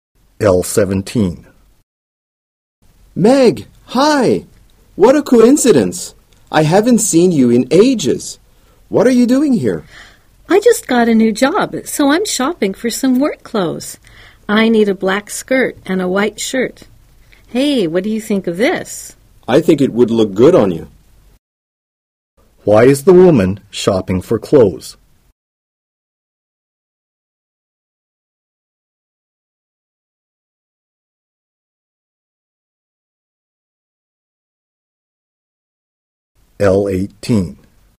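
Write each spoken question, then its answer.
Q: Why is the woman shopping for clothes?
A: She got a new job and needs work clothes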